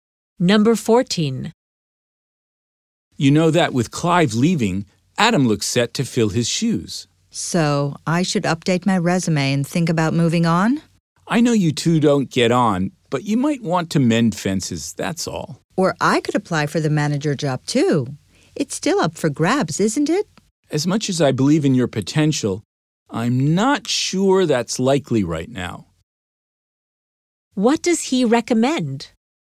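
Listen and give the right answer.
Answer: Making peace with Adam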